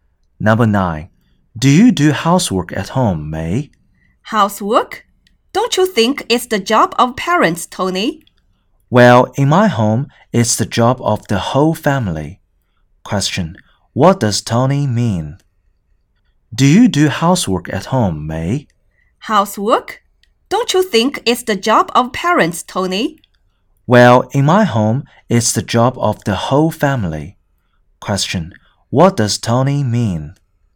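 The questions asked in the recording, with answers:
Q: What does Tony mean?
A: Housework is the job of the whole family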